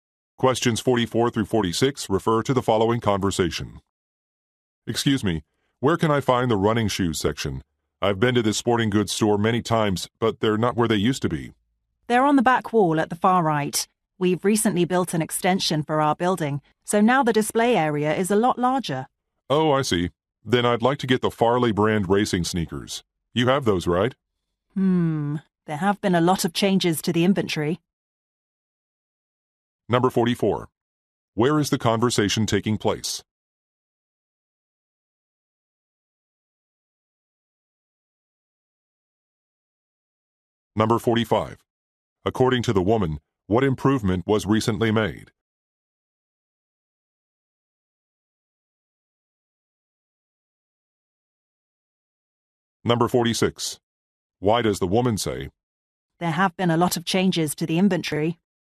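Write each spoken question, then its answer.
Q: Where is the conversation taking place?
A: At a sporting goods store

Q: According to the woman, what improvement was recently made?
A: The building was extended, giving a larger display area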